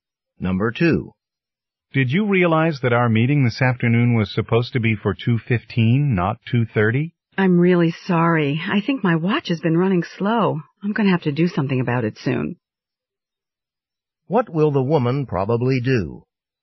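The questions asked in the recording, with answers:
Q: What will the woman probably do?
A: Get her watch fixed or replaced.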